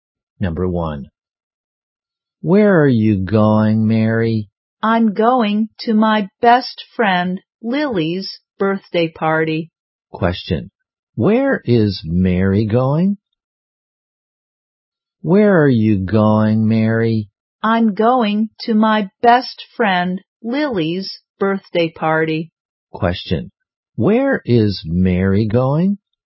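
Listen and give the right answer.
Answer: To her best friend Lily's birthday party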